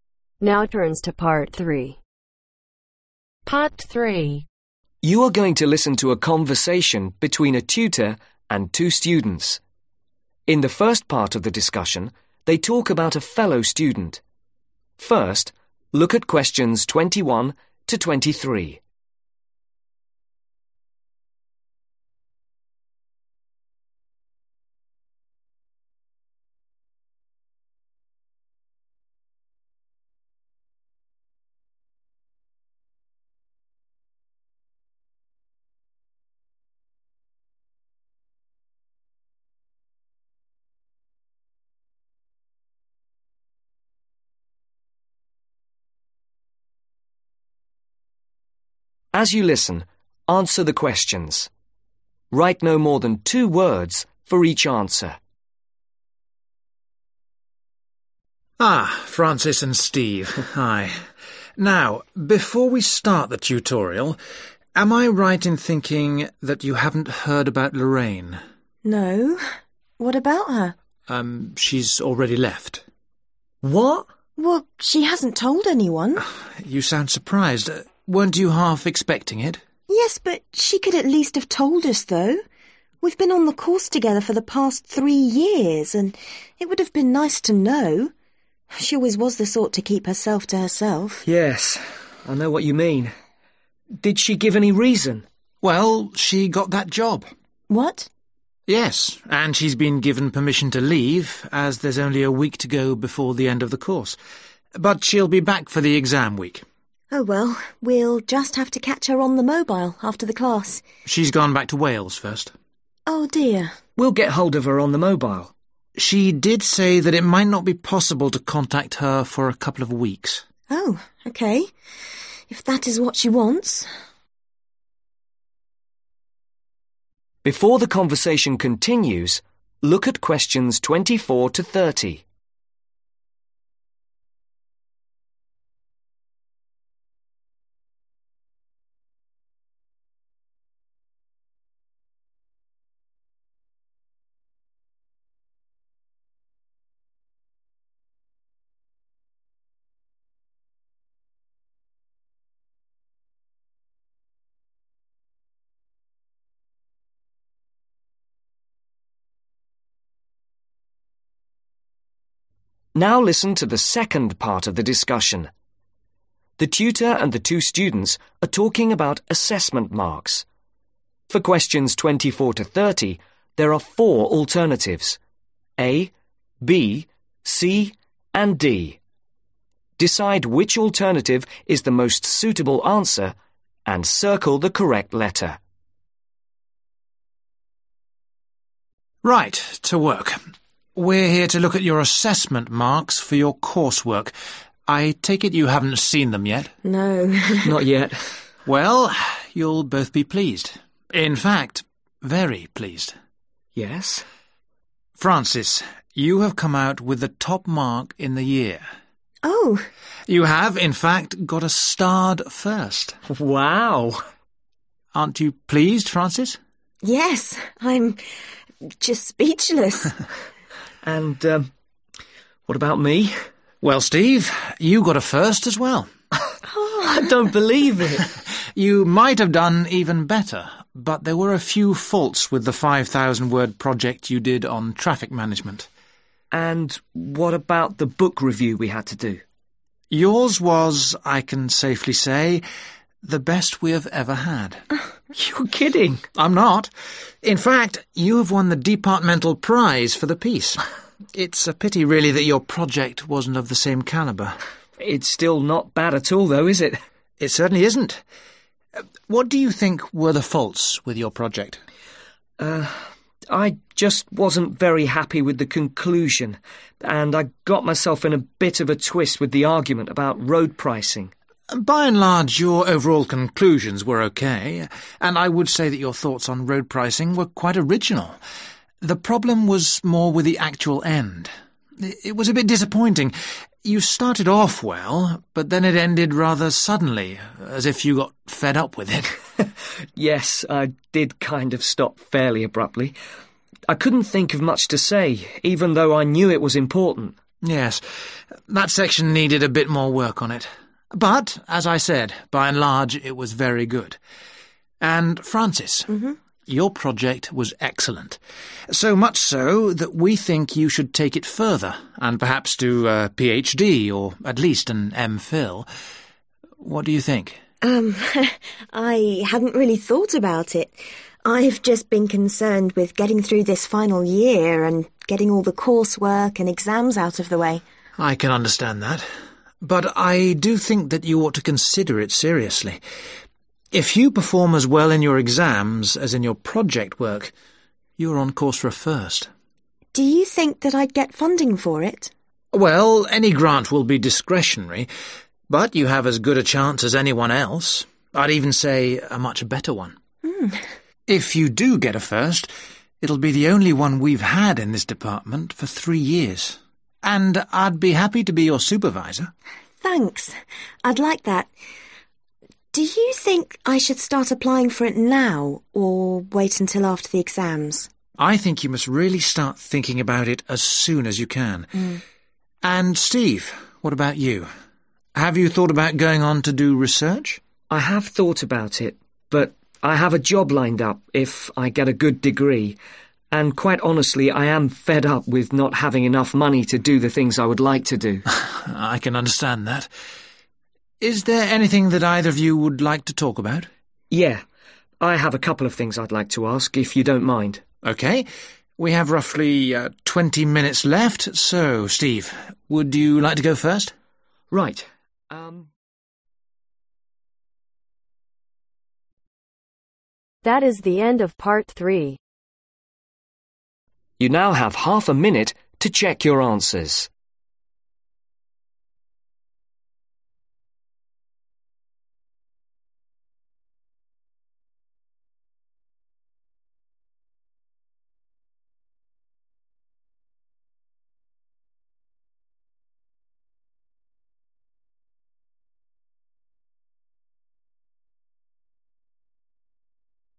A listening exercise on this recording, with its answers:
Write NO MORE THAN TWO WORDS for each answer.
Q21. - has been with them on the course for (21)............ .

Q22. - has left because she has got a (22)............ .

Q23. - has returned to (23)............. .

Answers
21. Three
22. Job
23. Wales